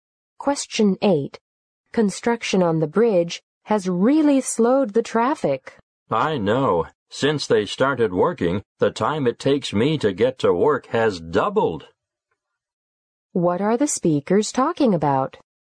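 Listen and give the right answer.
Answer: Traffic slowed by construction on the bridge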